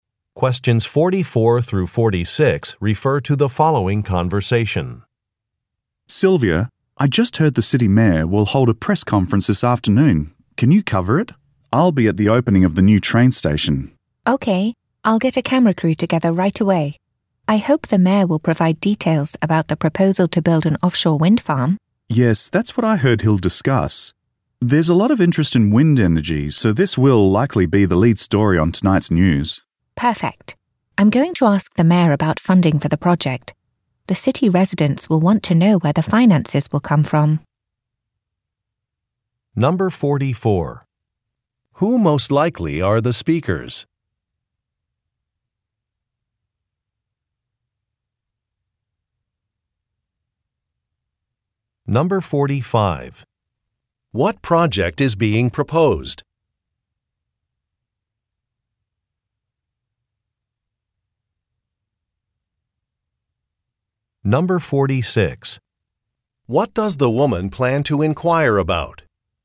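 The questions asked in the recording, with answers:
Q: Who most likely are the speakers?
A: News reporters

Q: What project is being proposed?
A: An offshore wind farm

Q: What does the woman plan to inquire about?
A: Funding for the project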